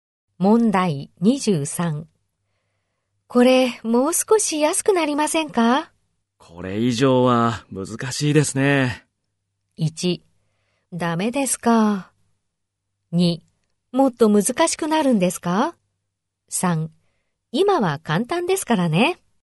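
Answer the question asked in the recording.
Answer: 1: ダメですか。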